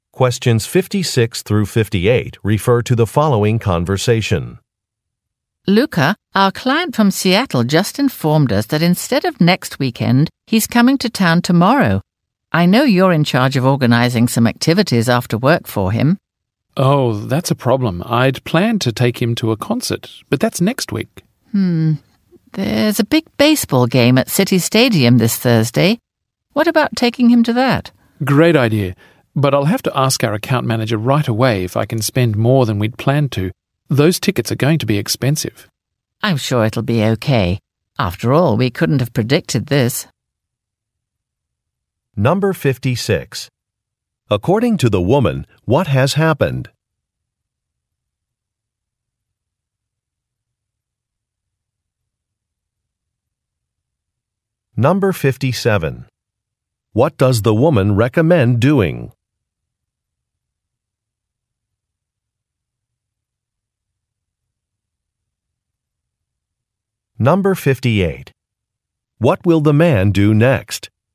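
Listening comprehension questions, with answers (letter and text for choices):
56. According to the woman. what has happened?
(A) Some merchandise has sold out.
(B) A client has rescheduled a visit.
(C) A director has reduced a budget.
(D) A document has been lost.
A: (B) A client has rescheduled a visit.

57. What does the woman recommend doing?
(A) Going to a sporting event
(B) Searching a Web site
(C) Inviting a company president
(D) Using a corporate credit card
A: (A) Going to a sporting event

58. What will the man do next?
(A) Pick up a rental car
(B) Check a calendar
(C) Talk to a colleague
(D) Update an online account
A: (C) Talk to a colleague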